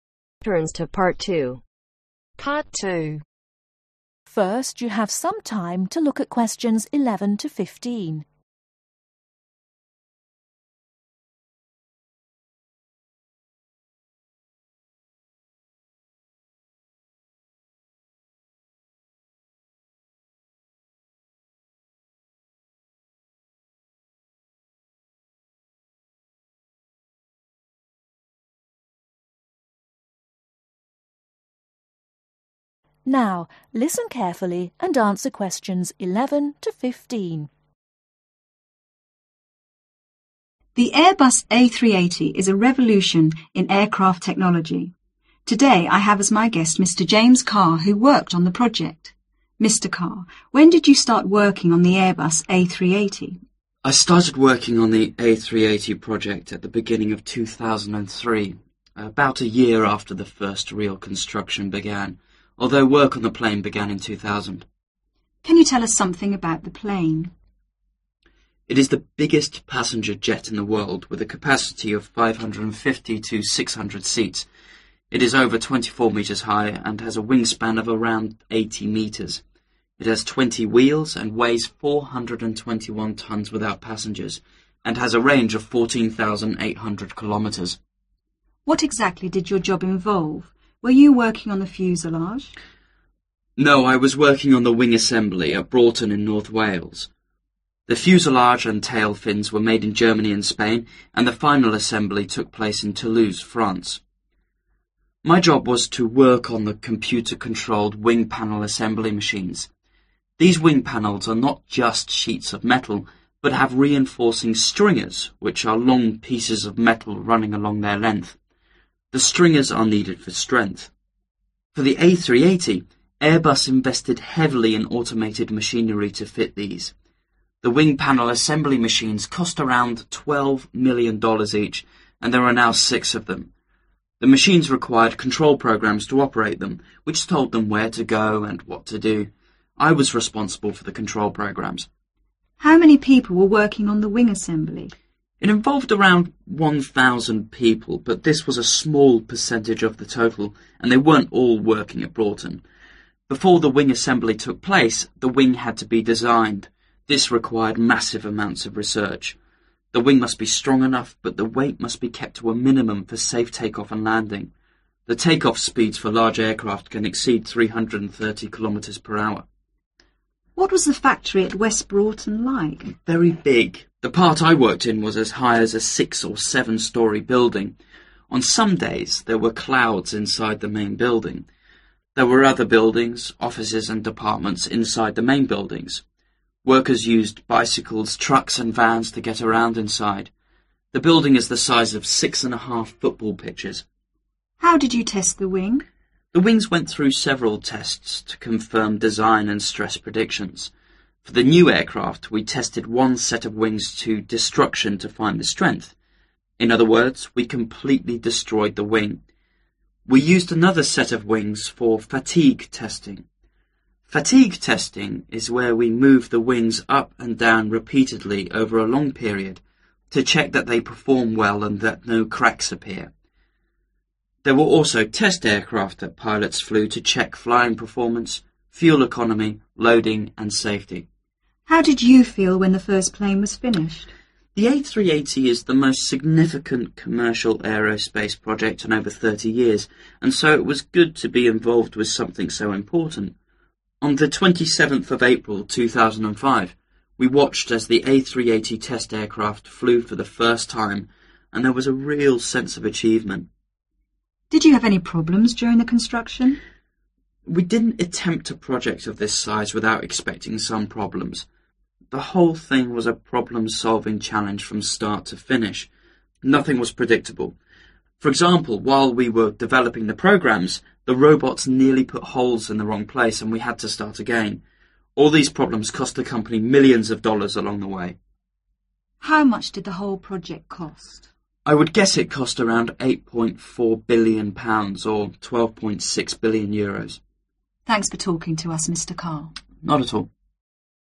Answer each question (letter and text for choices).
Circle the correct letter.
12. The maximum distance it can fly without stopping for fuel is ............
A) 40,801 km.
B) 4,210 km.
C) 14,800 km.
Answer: C) 14,800 km.

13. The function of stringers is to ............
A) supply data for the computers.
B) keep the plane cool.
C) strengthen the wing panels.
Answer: C) strengthen the wing panels.

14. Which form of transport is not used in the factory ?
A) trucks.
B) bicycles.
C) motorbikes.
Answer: C) motorbikes.

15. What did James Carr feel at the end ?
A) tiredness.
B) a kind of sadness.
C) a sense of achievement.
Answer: C) a sense of achievement.